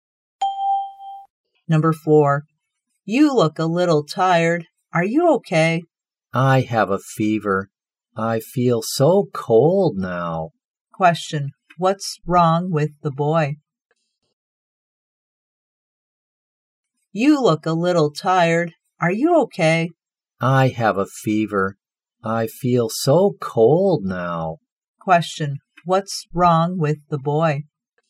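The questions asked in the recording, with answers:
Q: Question, what's wrong with the boy?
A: He has a fever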